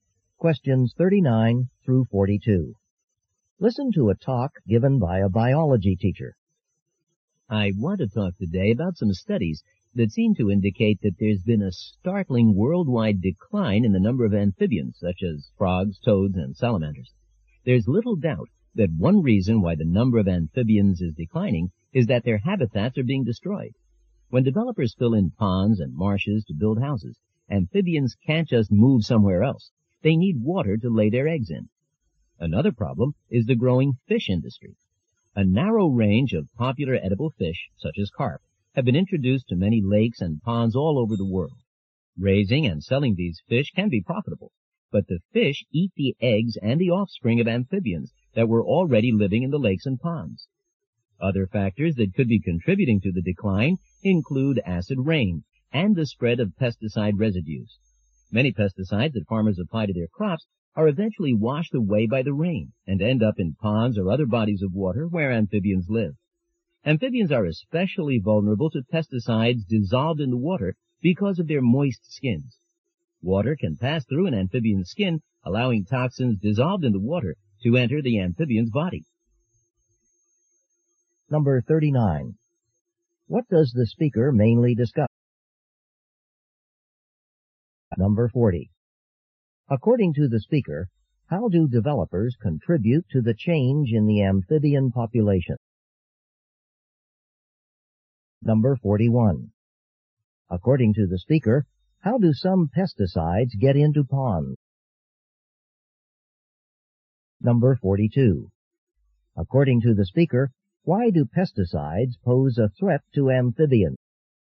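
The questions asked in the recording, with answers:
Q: What does the speaker mainly discuss?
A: The decline in the number of amphibians

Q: According to the speaker, how do developers contribute to the change in the amphibian population?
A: They fill in ponds and marshes, destroying habitats

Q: According to the speaker, how do some pesticides get into ponds?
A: Rain washes them off crops

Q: According to the speaker, why do pesticides pose a threat to amphibians?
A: Toxins in water pass through their moist skin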